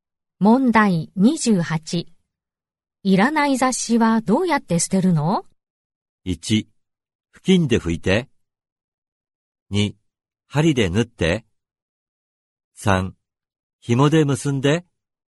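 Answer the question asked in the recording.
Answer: 3: 紐で結んで。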